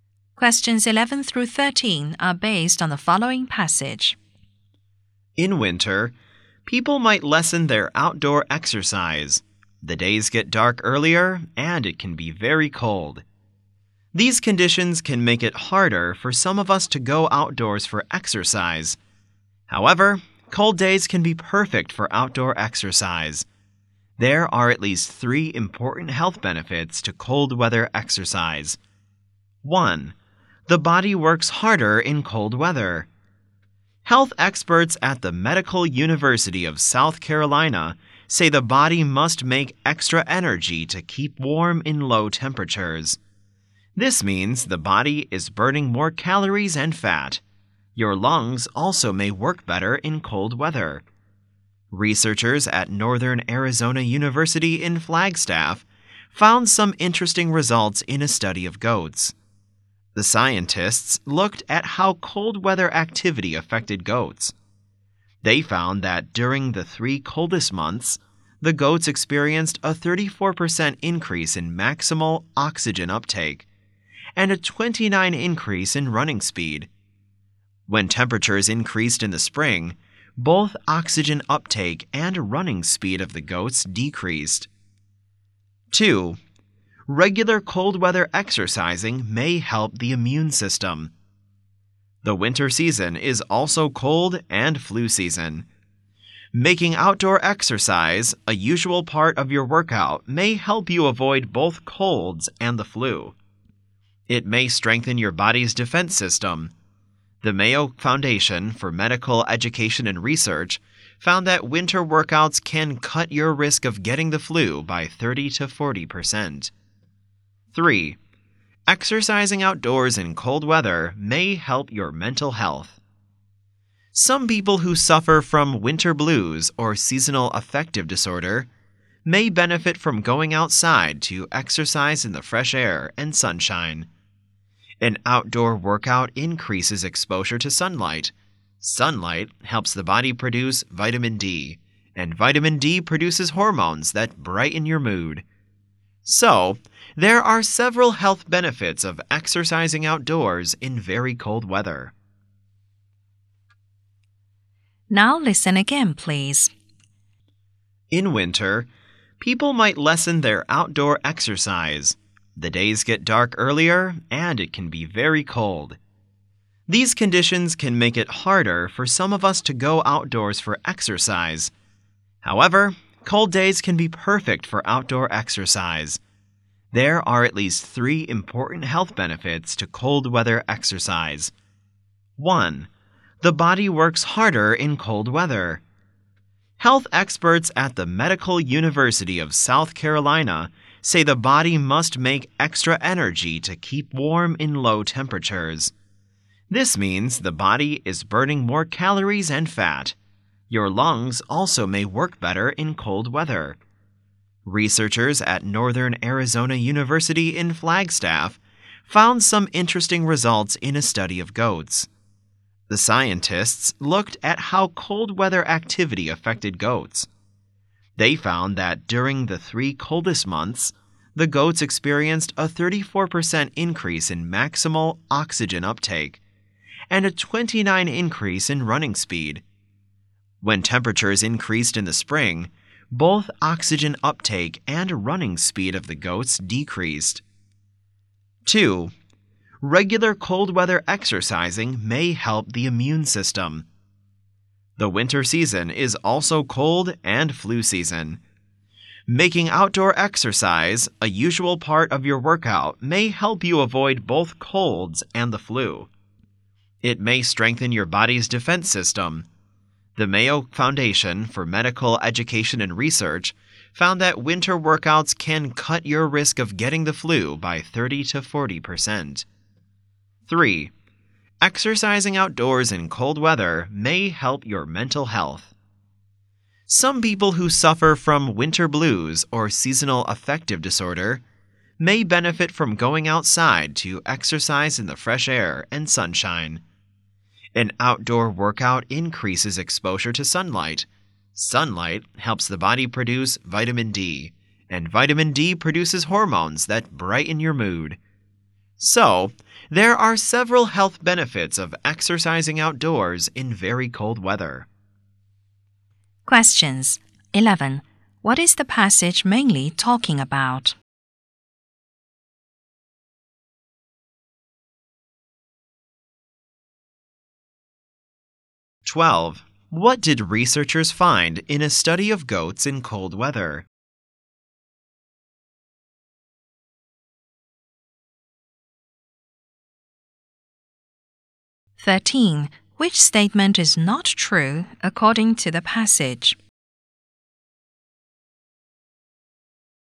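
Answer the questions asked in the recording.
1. The health benefits of exercising outdoors in cold weather
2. In the coldest months, the goats' maximal oxygen uptake rose 34% and their running speed rose 29%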